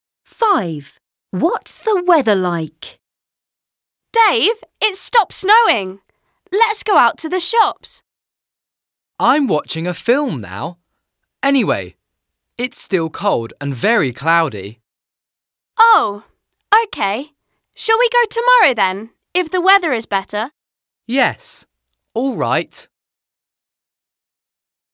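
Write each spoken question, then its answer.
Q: What's the weather like?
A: cold and cloudy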